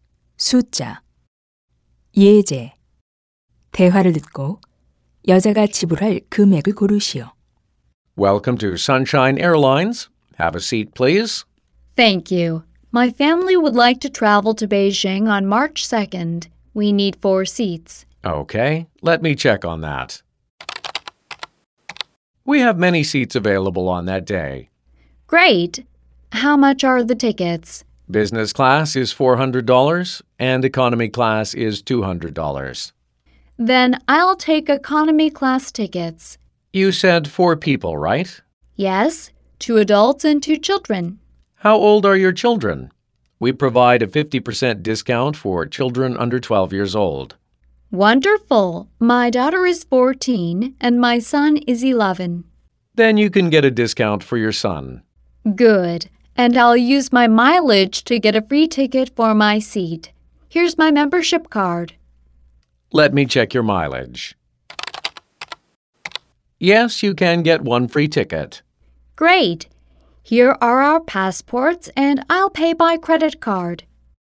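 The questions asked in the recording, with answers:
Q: 대화를 듣고 여자가 지불할 금액을 고르시오.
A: $500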